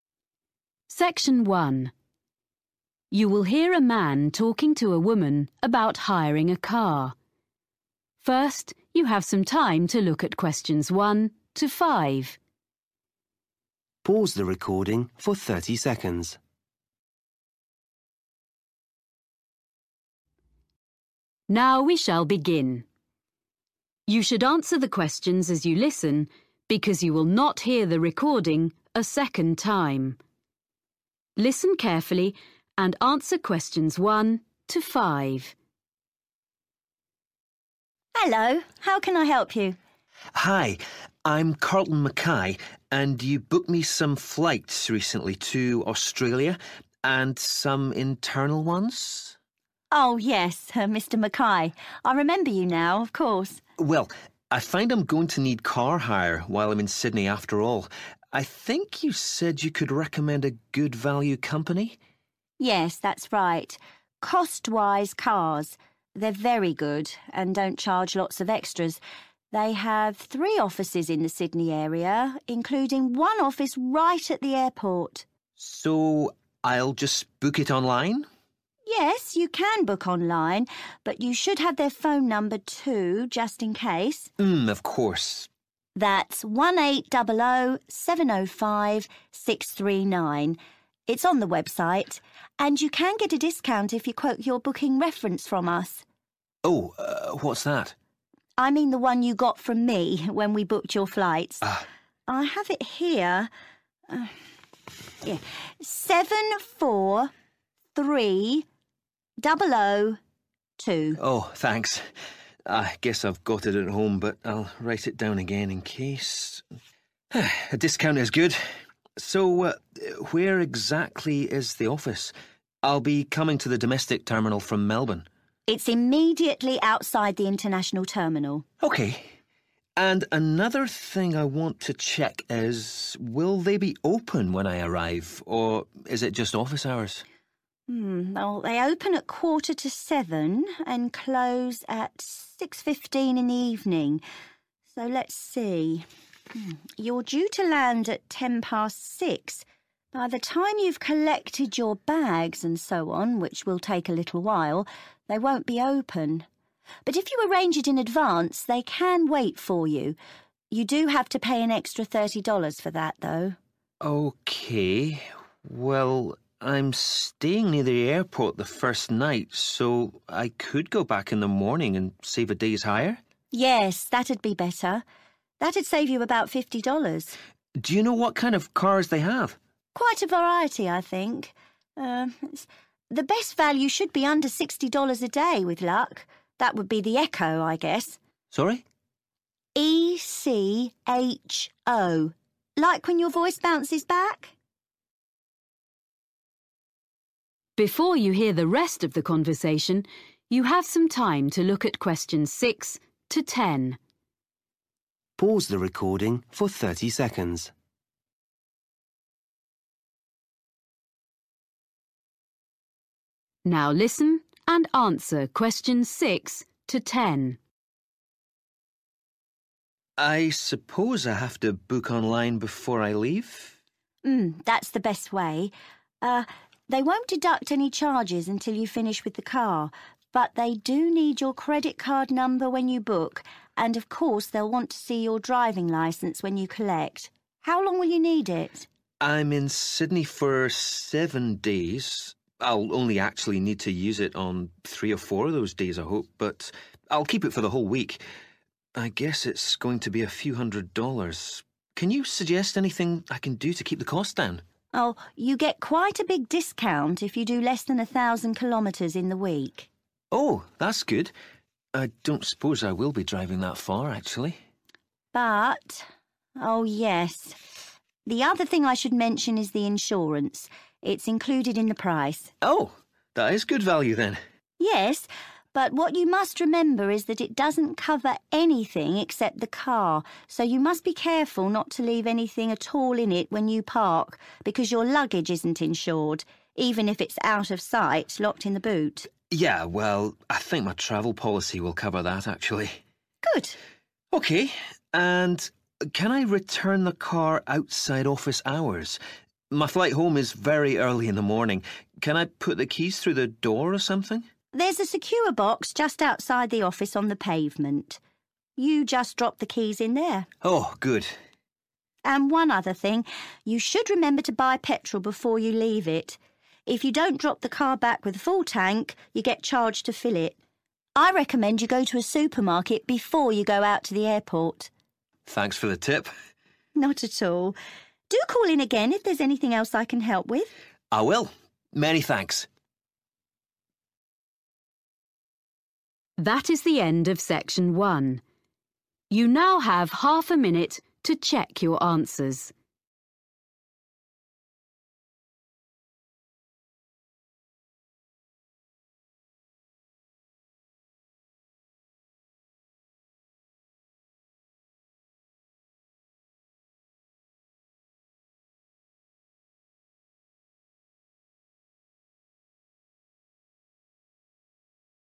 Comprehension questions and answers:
Complete the notes below. Write NO MORE THAN TWO WORDS AND/ OR A NUMBER for each answer.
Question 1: Booking reference number – (1)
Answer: 743002

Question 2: Office just by (2) terminal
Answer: international

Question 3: Opening hours (3) to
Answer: 6.15 pm

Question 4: After hours charges – (4) $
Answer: 30

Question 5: Cheapest model of car available – (5)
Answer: echo

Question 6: Information needed when booking – (6) number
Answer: credit card

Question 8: Reduce cost by driving under (8) km per week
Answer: 1000

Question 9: Insurance does not cover – (9)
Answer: luggage

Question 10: After hours put keys in box near the office on the (10)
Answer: pavement